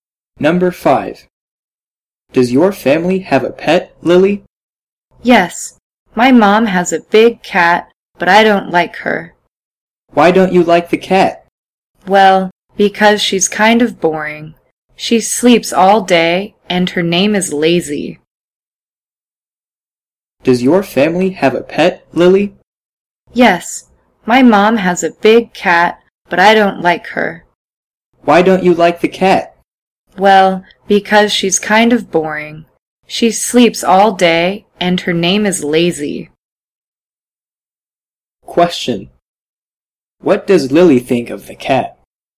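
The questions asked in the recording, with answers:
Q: What does Lily think of the cat?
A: She's kind of boring.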